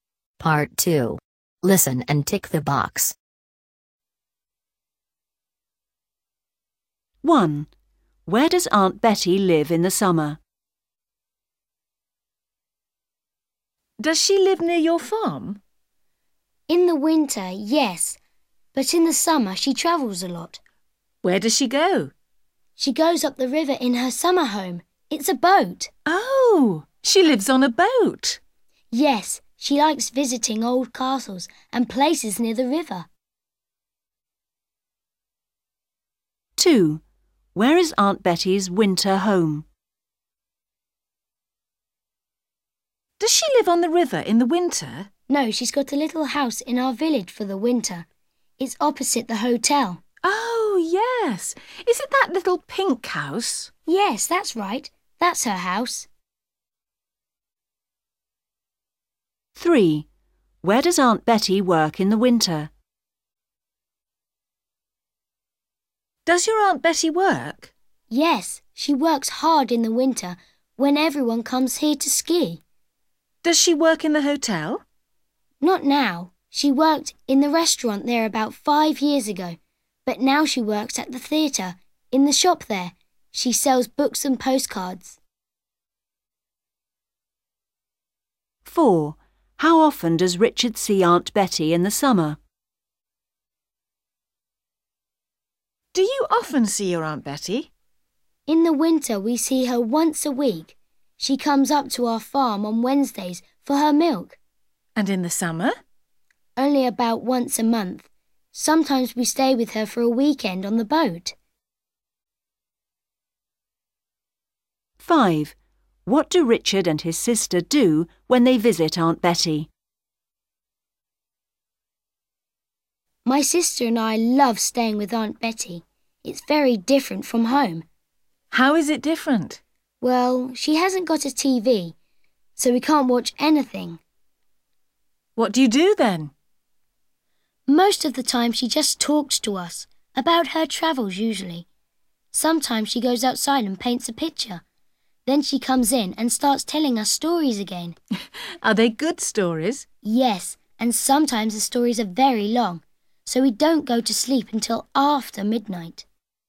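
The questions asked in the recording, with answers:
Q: Where does Aunt Betty live in the summer?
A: On a boat

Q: Where is Aunt Betty's winter home?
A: A little pink house opposite the hotel in the village

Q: Where does Aunt Betty work in the winter?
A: In the shop at the theatre

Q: How often does Richard see Aunt Betty in the summer?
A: About once a month

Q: What do Richard and his sister do when they visit Aunt Betty?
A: They listen to her stories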